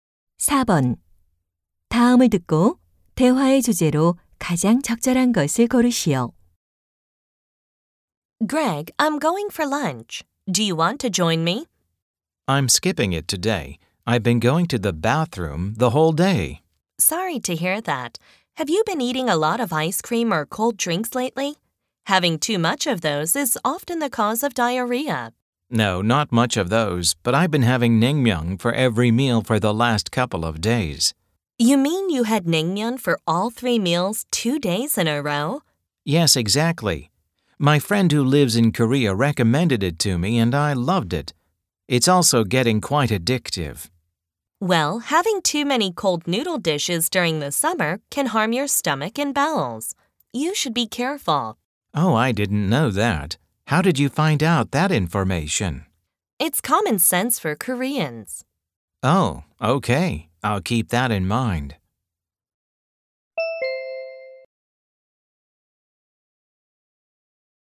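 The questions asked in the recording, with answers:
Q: 다음을 듣고 대화의 주제로 가장 적절한 것을 고르시오.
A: 여름철 찬 음식(냉면)을 너무 많이 먹으면 배탈이 날 수 있음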